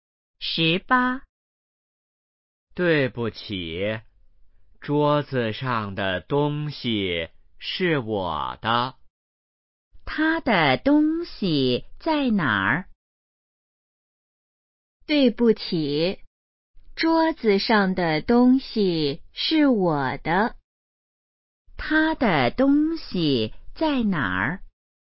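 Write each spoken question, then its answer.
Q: 他的东西在哪儿?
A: 桌子上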